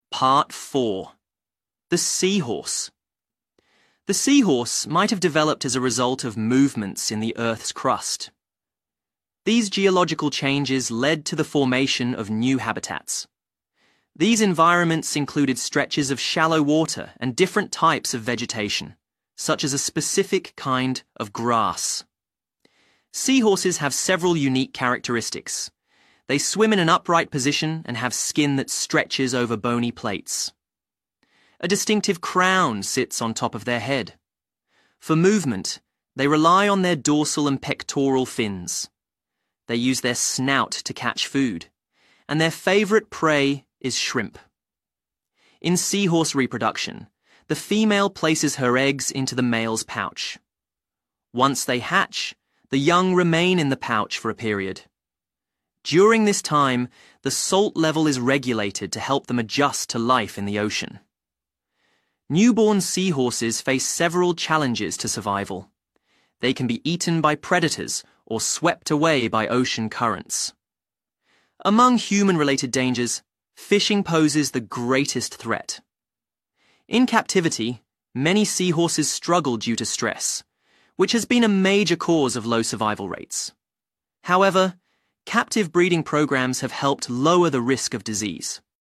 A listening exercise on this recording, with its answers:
Complete the notes below Write ONE WORD ONLY for each answer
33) They have skin that stretches over bony 33.......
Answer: Plates

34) A distinctive 34...... sits on top of their head.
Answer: Crown

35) They use their snout to catch food, and their favorite prey is 35.......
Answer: Shrimp

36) During this time, the 36...... level is regulated to help them adjust to life in the ocean.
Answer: Salt

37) They can be eaten by predators or swept away by ocean 37.......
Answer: Currents

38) Among human-related dangers, 38...... poses the greatest threat.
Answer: Fishing

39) Many seahorses struggle due to 39......, which has been a major cause of low survival rates.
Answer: stress

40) However, captive breeding programmes have helped lower the risk of 40.......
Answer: disease